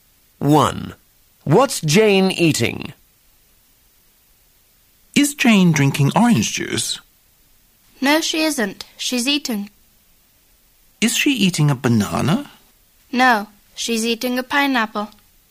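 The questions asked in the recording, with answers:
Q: What's Jane eating?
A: A pineapple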